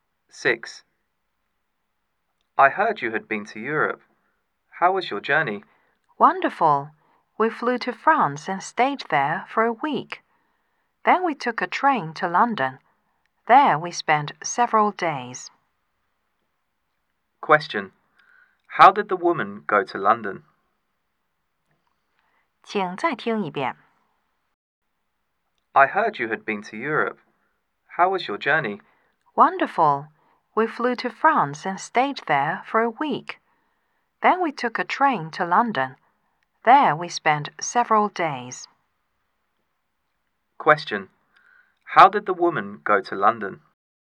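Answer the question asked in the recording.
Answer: By train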